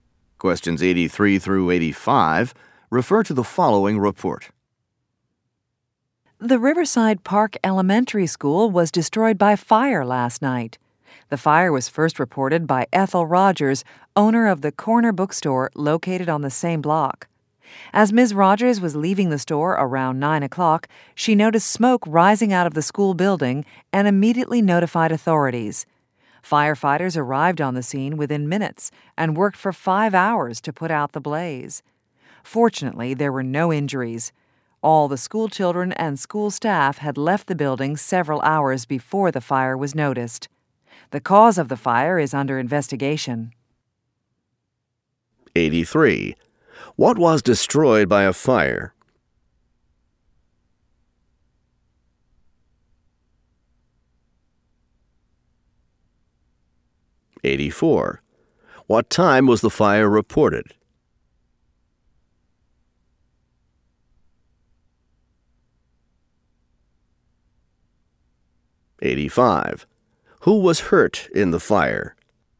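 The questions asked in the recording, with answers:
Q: What was destroyed by a fire?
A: An elementary school

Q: What time was the fire reported?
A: Around 9 o'clock

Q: Who was hurt in the fire?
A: Nobody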